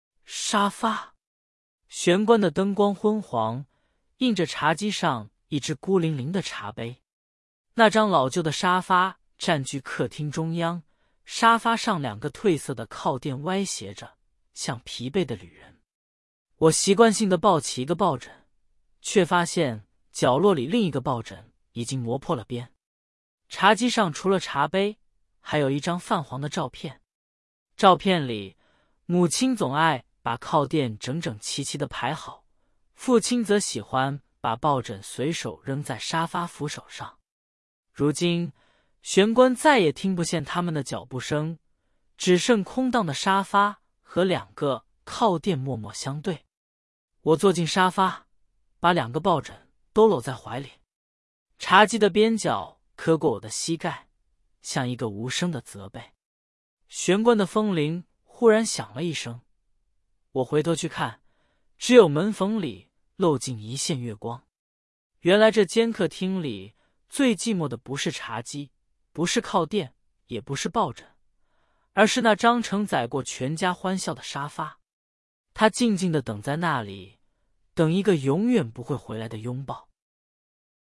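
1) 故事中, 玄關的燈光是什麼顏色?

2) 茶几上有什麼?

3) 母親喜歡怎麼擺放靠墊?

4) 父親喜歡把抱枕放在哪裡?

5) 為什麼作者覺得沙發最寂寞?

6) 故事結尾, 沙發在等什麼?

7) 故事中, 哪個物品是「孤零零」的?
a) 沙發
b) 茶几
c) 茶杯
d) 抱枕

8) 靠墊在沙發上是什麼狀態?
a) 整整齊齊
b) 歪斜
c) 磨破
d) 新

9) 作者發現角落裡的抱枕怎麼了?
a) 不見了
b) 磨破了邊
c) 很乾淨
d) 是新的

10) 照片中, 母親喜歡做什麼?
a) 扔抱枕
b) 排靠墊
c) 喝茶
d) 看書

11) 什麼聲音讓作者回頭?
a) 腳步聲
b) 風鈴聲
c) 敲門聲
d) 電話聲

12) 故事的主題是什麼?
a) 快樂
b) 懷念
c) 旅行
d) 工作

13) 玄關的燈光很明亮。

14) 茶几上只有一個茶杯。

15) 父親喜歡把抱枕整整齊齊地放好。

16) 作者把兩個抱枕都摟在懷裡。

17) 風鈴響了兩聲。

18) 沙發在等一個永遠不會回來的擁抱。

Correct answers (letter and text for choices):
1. 昏黃
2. 一隻茶杯和一張泛黃的照片
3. 整整齊齊地排好
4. 隨手扔在沙發扶手上
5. 因為它承載過全家的歡笑,現在家人不在了
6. 一個永遠不會回來的擁抱
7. c) 茶杯
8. b) 歪斜
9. b) 磨破了邊
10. b) 排靠墊
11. b) 風鈴聲
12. b) 懷念
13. 錯
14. 錯
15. 錯
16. 對
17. 錯
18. 對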